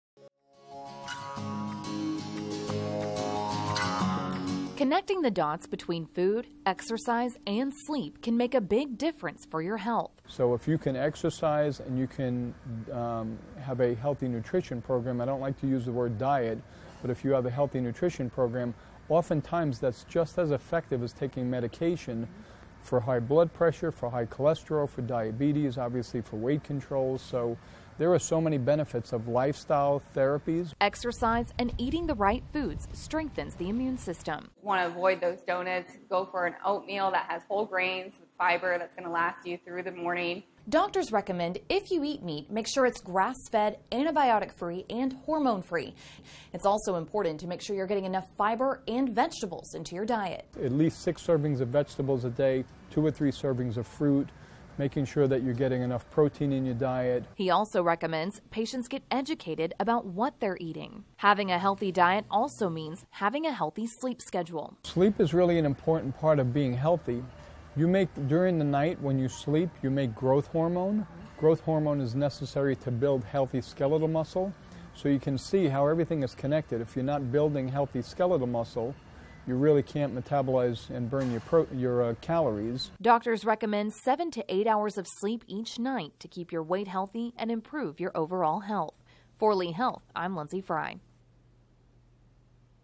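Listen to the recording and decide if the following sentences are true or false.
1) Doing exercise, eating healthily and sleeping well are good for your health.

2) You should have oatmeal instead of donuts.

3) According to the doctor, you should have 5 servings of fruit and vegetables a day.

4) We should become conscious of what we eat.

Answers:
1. True
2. True
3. False
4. True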